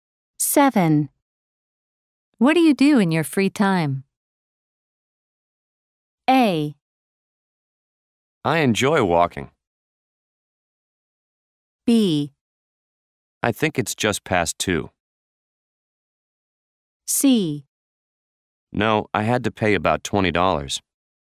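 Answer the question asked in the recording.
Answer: A: I enjoy walking.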